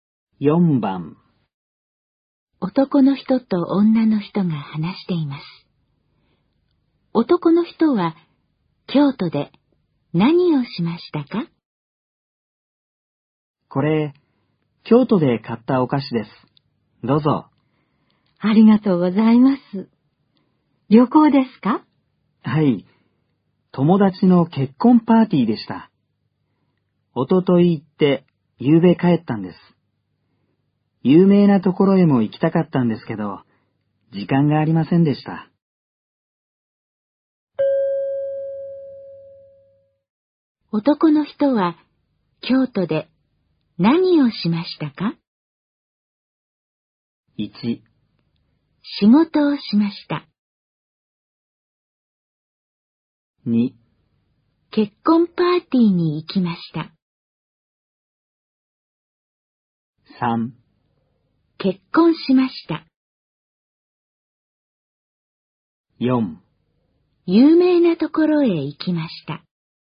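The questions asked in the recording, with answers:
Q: 男の人は、京都で何をしましたか?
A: 2: 結婚パーティーに行きました。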